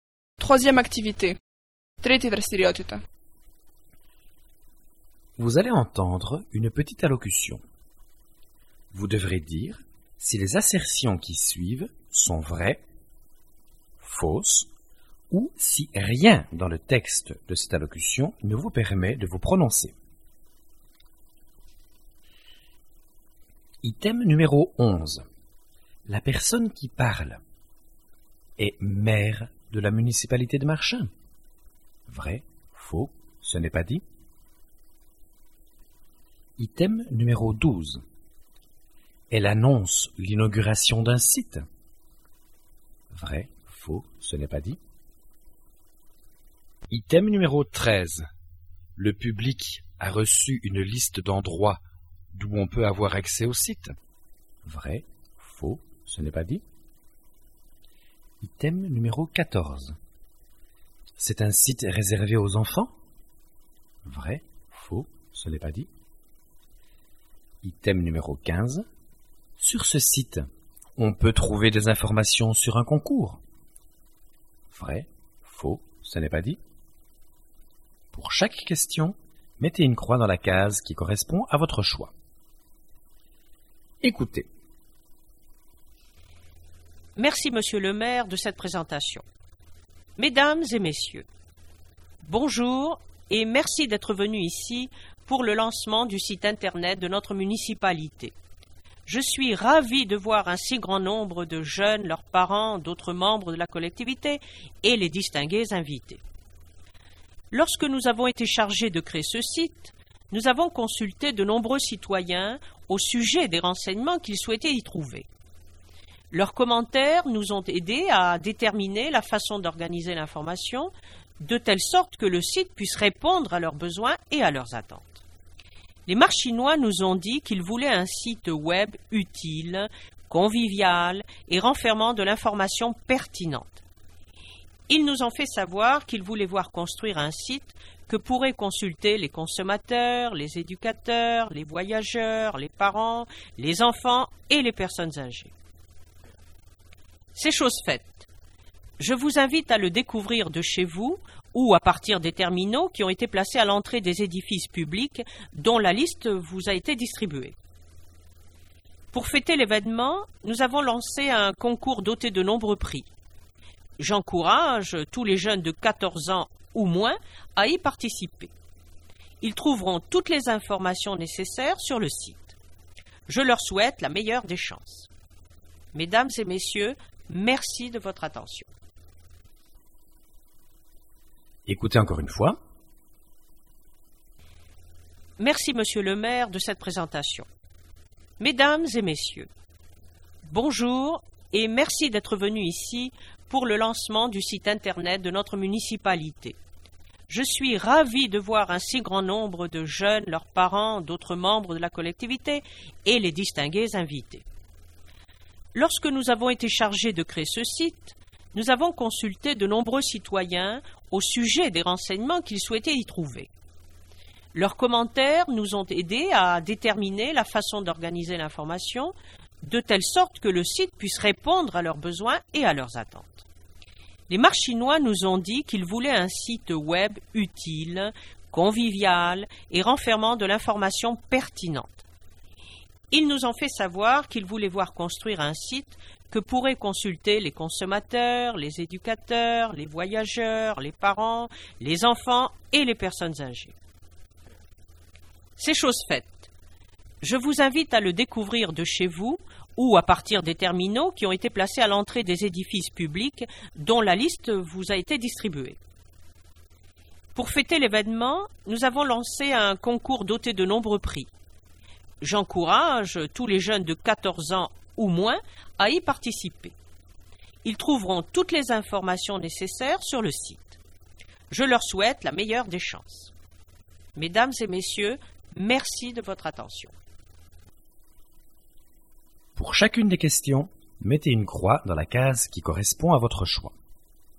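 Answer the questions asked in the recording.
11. Faux
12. Vrai
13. Vrai
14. Faux
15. Vrai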